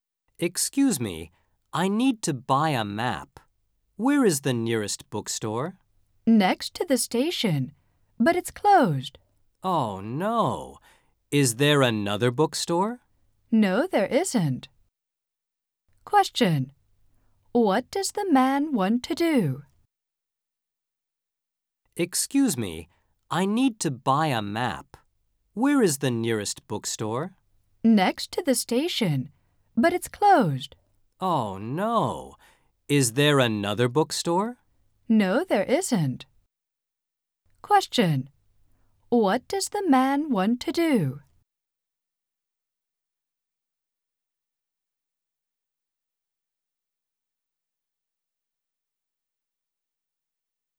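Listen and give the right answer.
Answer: Buy a map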